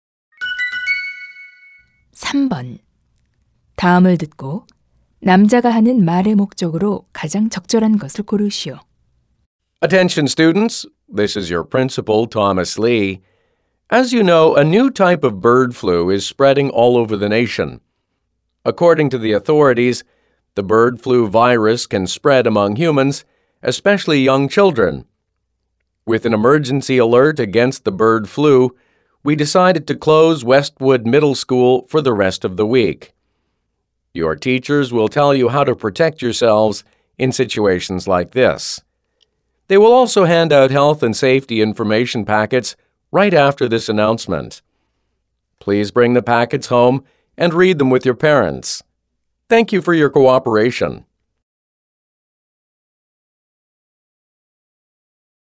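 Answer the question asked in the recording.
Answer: 조류 독감으로 인한 휴교를 알리려고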